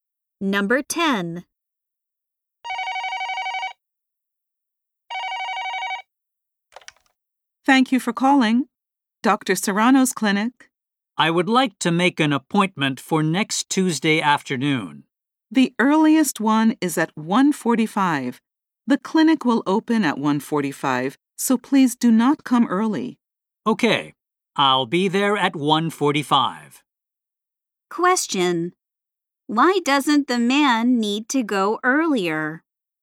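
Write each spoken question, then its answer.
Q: Why doesn't the man need to go earlier?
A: The clinic opens at 1:45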